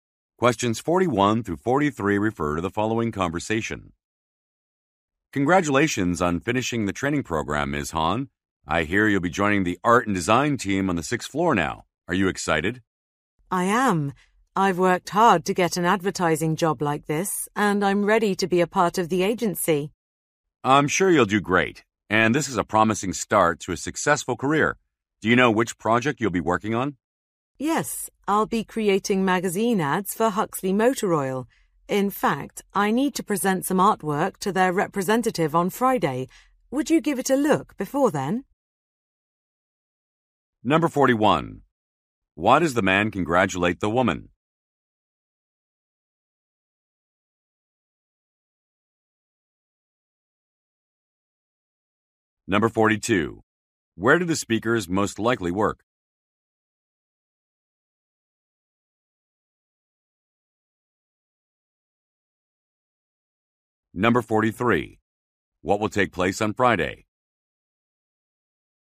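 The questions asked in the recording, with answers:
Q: Why does the man congratulate the woman?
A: She finished the training program

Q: Where do the speakers most likely work?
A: At an advertising agency

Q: What will take place on Friday?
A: She will present artwork to a client's representative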